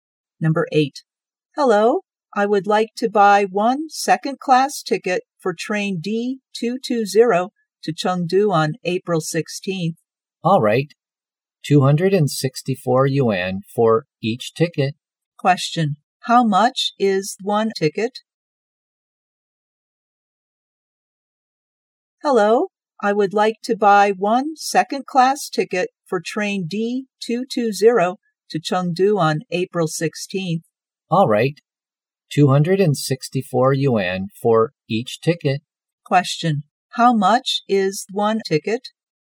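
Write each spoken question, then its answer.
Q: Question. How much is one ticket?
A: 264 yuan.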